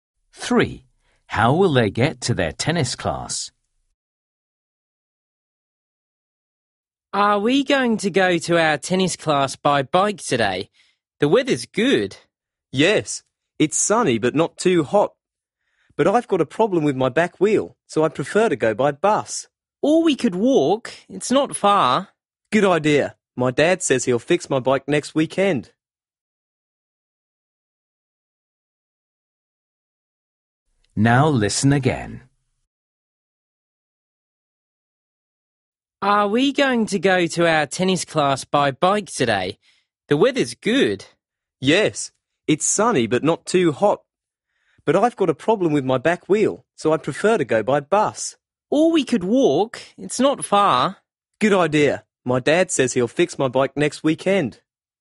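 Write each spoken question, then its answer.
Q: How will they get to their tennis class?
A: They will walk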